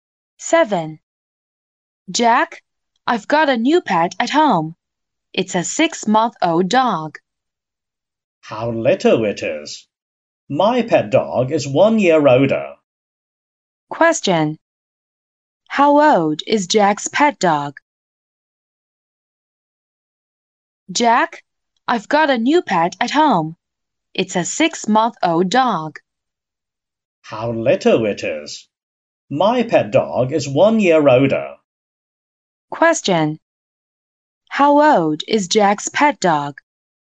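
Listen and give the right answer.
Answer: One and a half years old (18 months)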